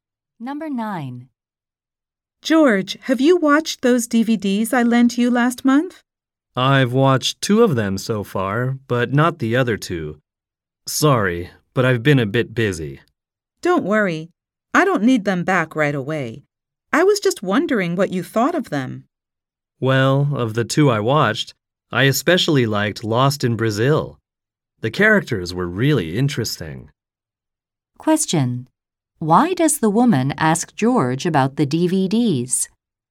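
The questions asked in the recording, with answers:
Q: Why does the woman ask George about the DVDs?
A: She wants to know what he thought of them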